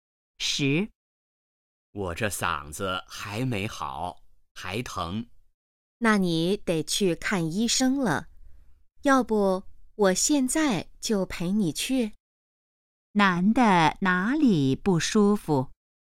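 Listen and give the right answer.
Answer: 嗓子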